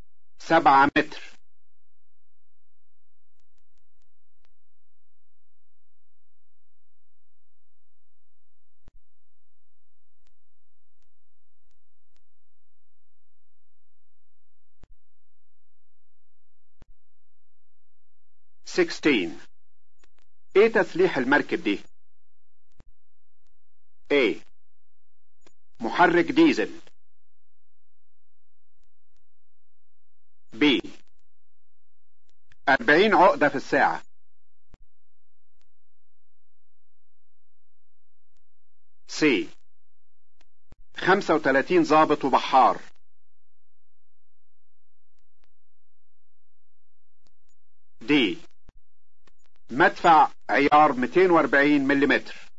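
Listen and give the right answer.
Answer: D: مدفع عيار 240 ملليمتر.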